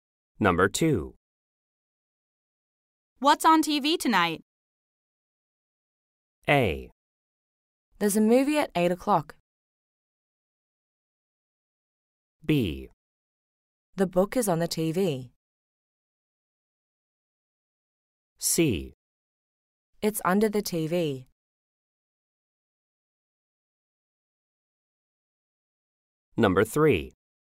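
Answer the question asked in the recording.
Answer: A: There's a movie at 8 o'clock.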